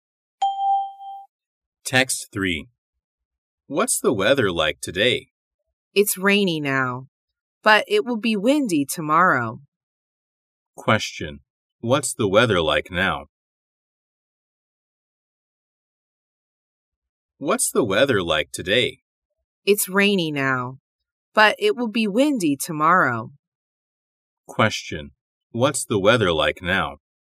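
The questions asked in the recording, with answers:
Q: What's the weather like now?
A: Rainy.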